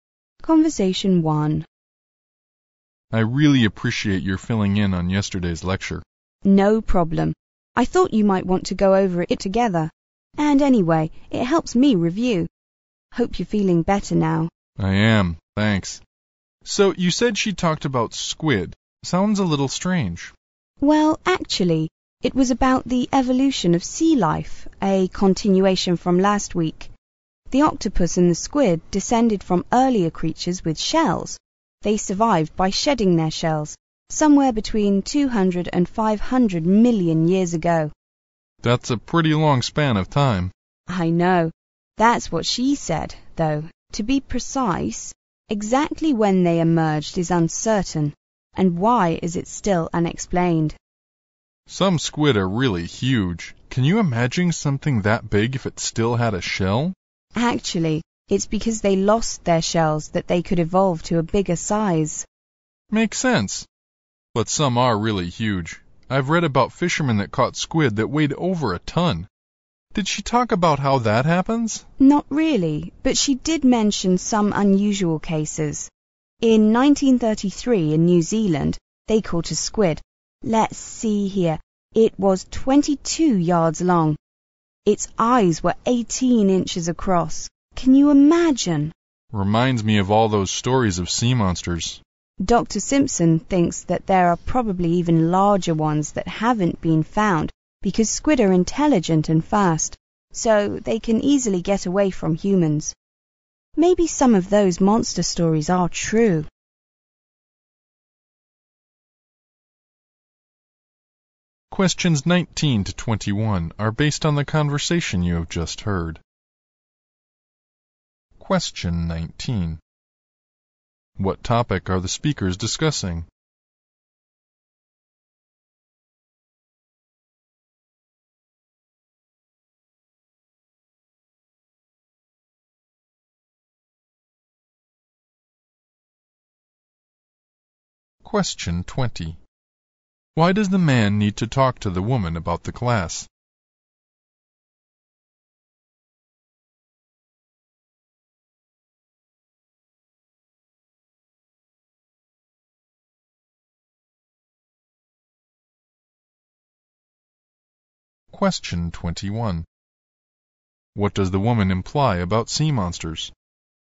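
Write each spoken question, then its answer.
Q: What topic are the speakers discussing?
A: The evolution of squid (sea life)

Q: Why does the man need to talk to the woman about the class?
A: He missed the lecture because he was sick

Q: What does the woman imply about sea monsters?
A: Some stories may be true; they may be giant squid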